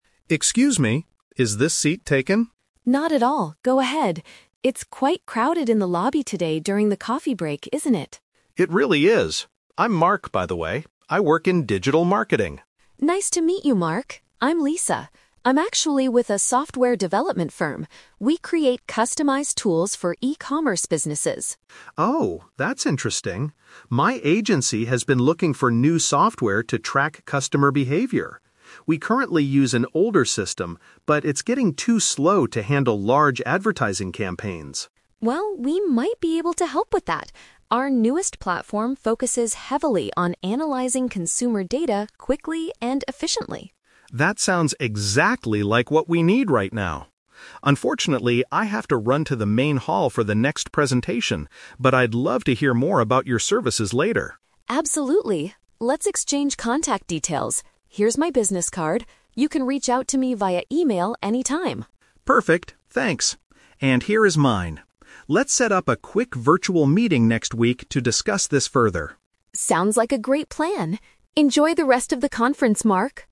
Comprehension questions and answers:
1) What industry does Lisa work in?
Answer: Computer program creation.

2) Why does Mark want to find a new system for his agency?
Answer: The current program cannot process information fast enough.

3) How do they plan to keep in touch?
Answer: By trading their printed professional information.

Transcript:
Mark: Excuse me, is this seat taken?
Lisa: Not at all, go ahead. It's quite crowded in the lobby today during the coffee break, isn't it?
Mark: It really is. I'm Mark, by the way. I work in digital marketing.
Lisa: Nice to meet you, Mark. I'm Lisa. I'm actually with a software development firm. We create customized tools for e-commerce businesses.
Mark: Oh, that's interesting! My agency has been looking for new software to track customer behavior. We currently use an older system, but it's getting too slow to handle large advertising campaigns.
Lisa: Well, we might be able to help with that. Our newest platform focuses heavily on analyzing consumer data quickly and efficiently.
Mark: That sounds exactly like what we need right now. Unfortunately, I have to run to the main hall for the next presentation, but I'd love to hear more about your services later.
Lisa: Absolutely. Let's exchange contact details. Here's my business card. You can reach out to me via email anytime.
Mark: Perfect, thanks. And here is mine. Let's set up a quick virtual meeting next week to discuss this further.